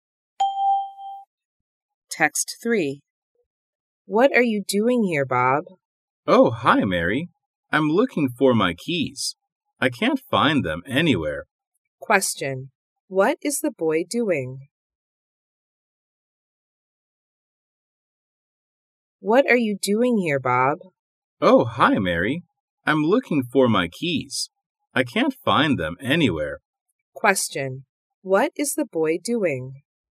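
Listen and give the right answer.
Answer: Looking for his keys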